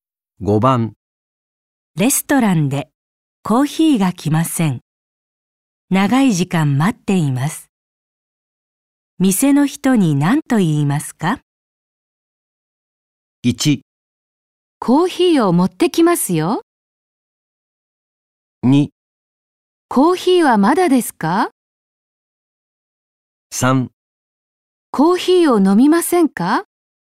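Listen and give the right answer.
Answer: 2: コーヒーはまだですか?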